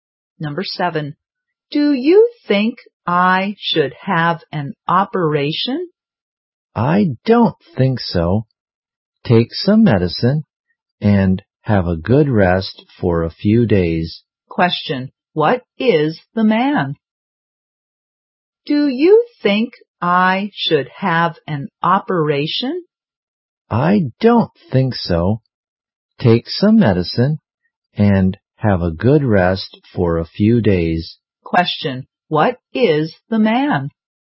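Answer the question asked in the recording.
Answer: A doctor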